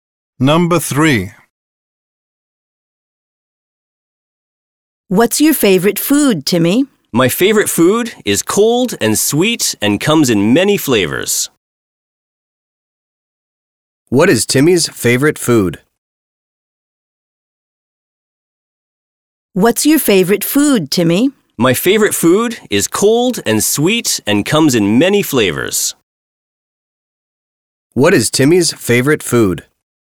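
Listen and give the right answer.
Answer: Ice cream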